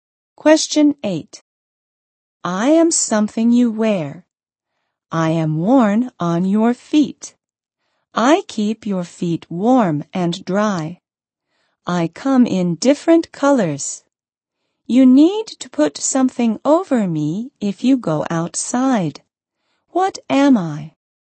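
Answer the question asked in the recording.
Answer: Socks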